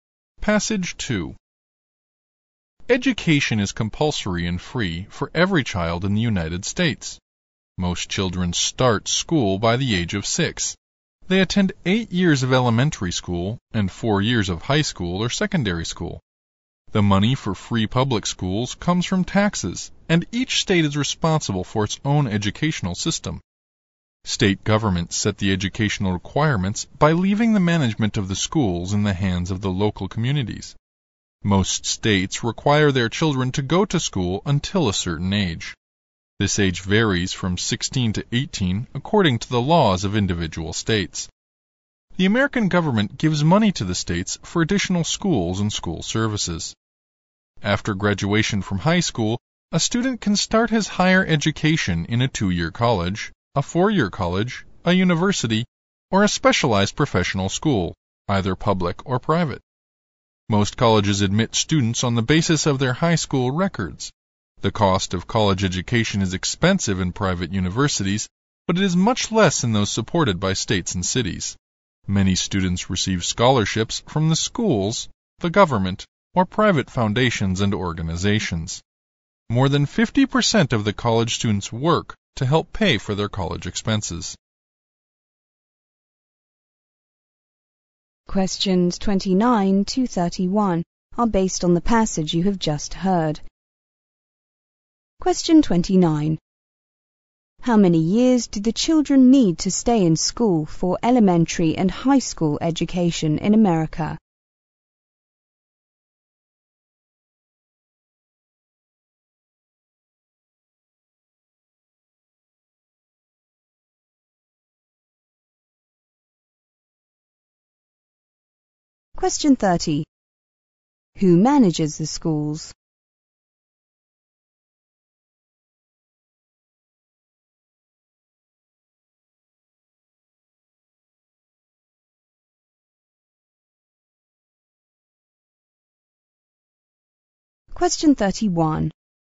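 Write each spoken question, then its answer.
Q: How many years do the children need to stay in school for elementary and high school education in America?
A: 12 years

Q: Who manages the schools?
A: The local communities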